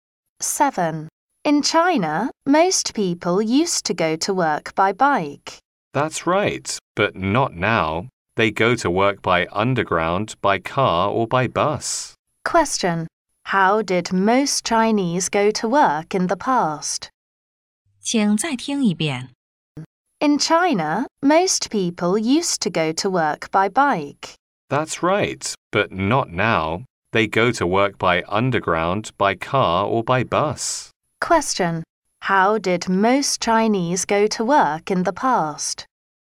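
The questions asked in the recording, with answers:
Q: How did most Chinese go to work in the past?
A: By bike.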